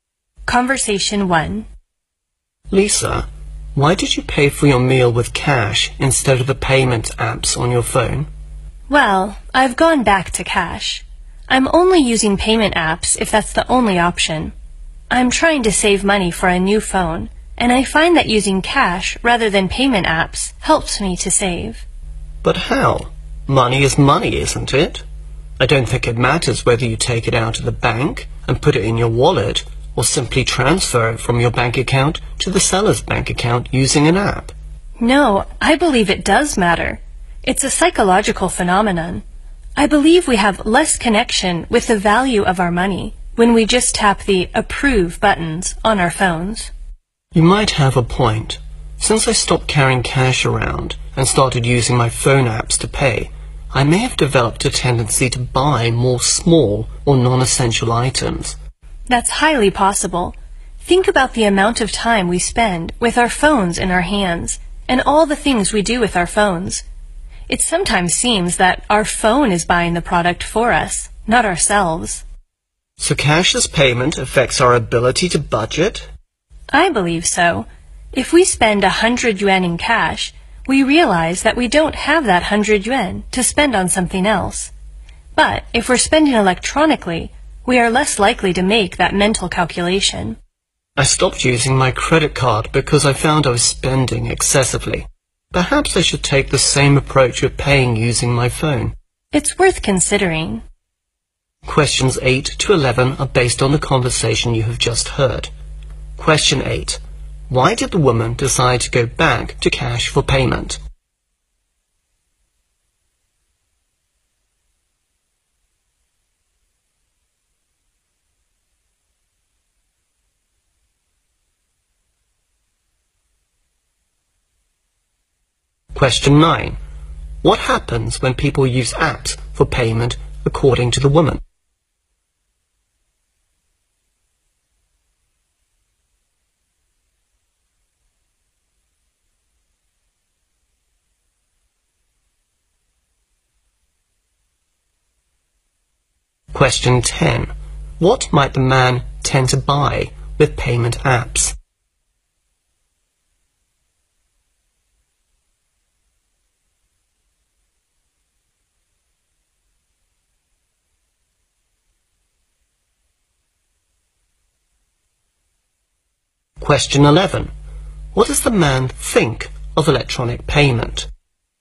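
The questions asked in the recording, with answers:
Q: Why did the woman decide to go back to cash for payment?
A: To save money for a new phone

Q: What happens when people use apps for payment according to the woman?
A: They have less connection with the value of their money

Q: What might the man tend to buy with payment apps?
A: Small or non-essential items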